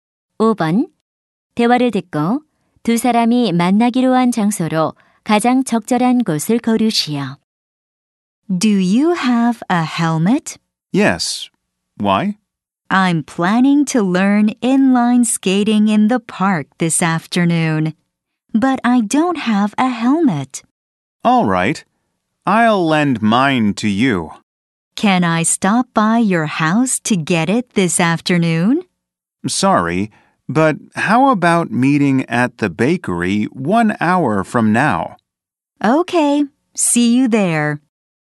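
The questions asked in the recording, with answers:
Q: 대화를 듣고 두 사람이 만나기로 한 장소로 가장 적절한 곳을 고르시오.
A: 제과점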